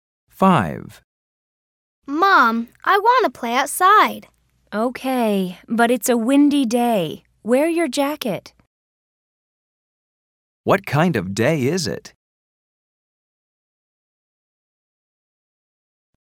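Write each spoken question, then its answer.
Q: What kind of day is it?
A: It's a windy day.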